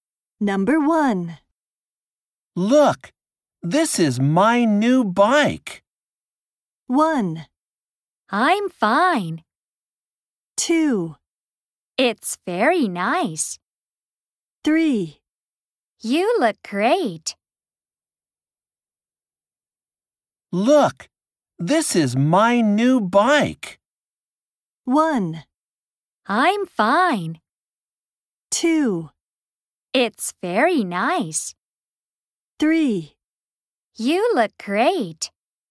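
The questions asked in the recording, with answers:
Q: Look, this is my new bike.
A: 2: It's very nice.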